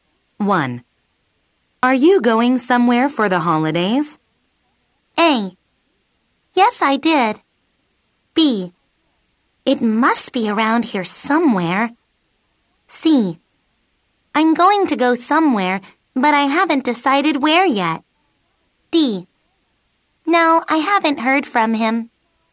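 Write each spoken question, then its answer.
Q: Are you going somewhere for the holidays?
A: C: I'm going to go somewhere, but I haven't decided where yet.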